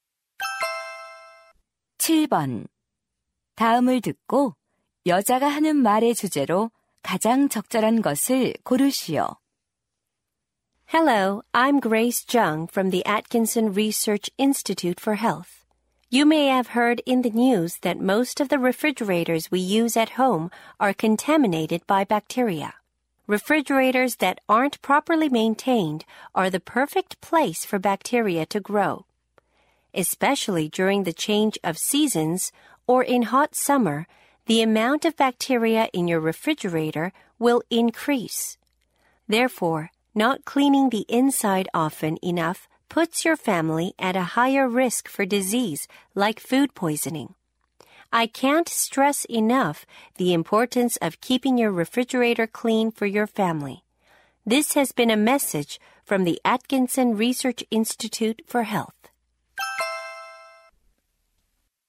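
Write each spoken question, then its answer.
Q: 다음을 듣고 여자가 하는 말의 주제로 가장 적절한 것을 고르시오.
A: 가족 건강을 위한 냉장고 청결 유지의 중요성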